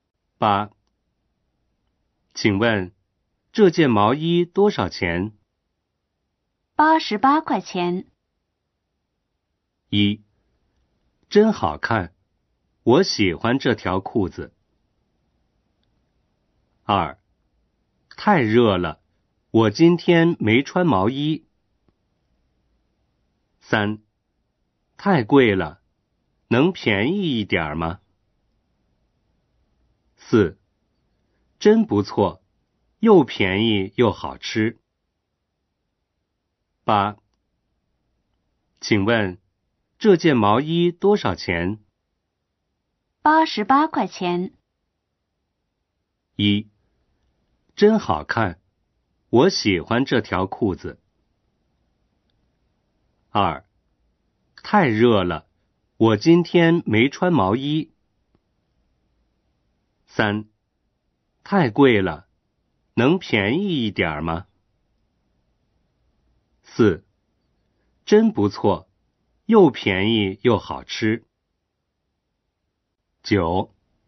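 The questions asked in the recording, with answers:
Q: 请问,这件毛衣多少钱?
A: 三: 太贵了,能便宜一点吗?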